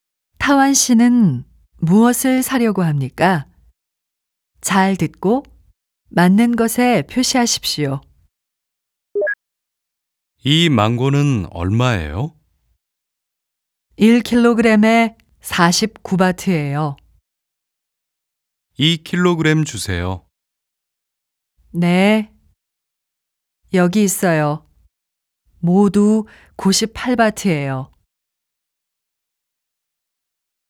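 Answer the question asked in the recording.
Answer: 망고 (2kg)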